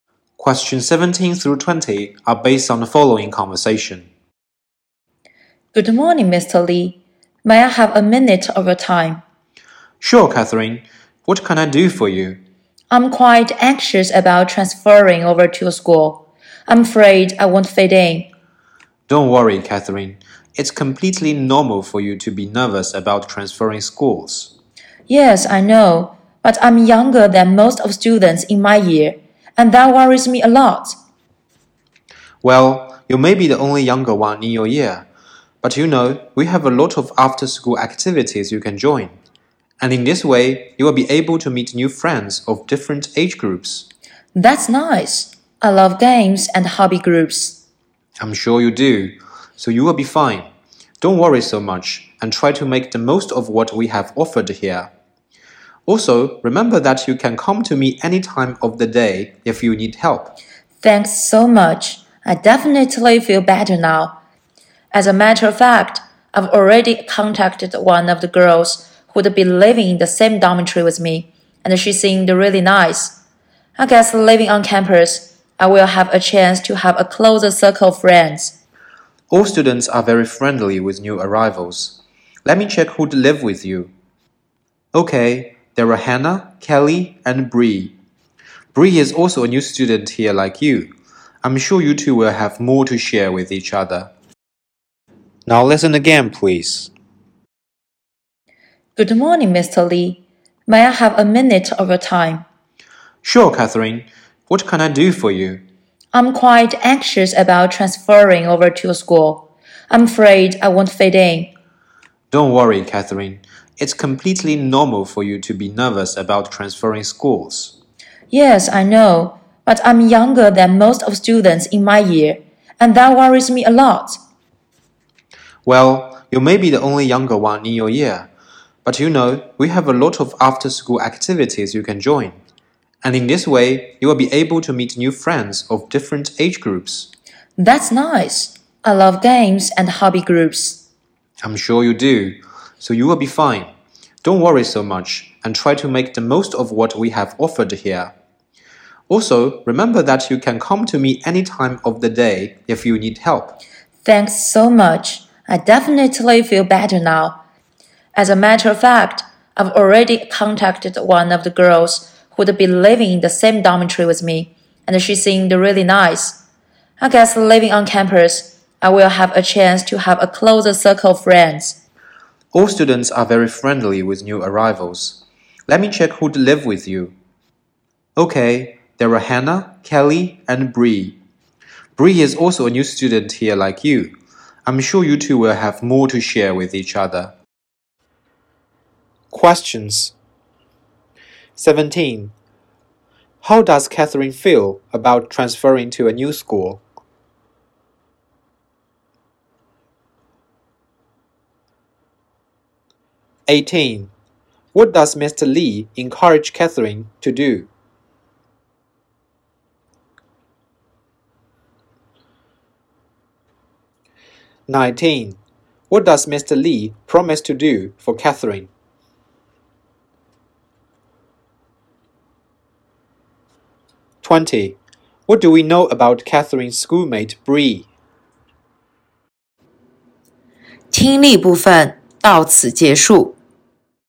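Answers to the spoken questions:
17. Anxious
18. Join after-school activities
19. Help her any time she needs
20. She is also a new student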